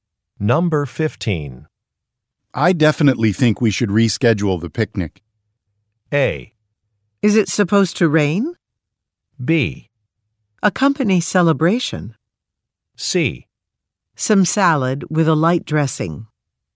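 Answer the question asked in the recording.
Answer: A: Is it supposed to rain?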